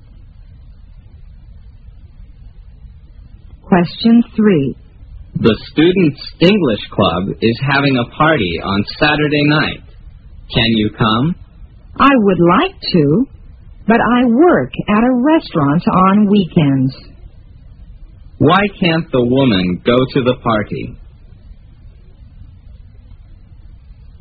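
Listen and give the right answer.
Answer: She works at a restaurant on weekends.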